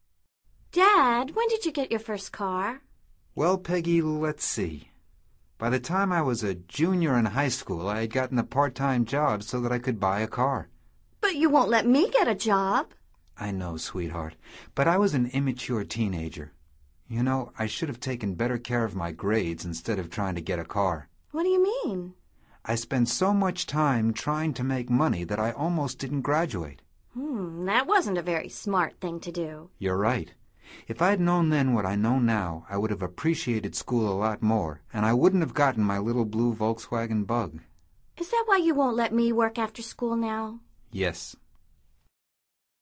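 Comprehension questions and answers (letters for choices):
Escucha atentamente esta conversación entre Peggy y su padre y selecciona la respuesta más adecuada de acuerdo con tu comprensión auditiva. No verifiques las respuestas de este ejercicio hasta finalizarlo.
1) When Peggy's dad was a teenager ...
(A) he bought a car.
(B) he worked full time.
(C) he didn't graduate from high school.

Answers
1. A

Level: Nivel Avanzado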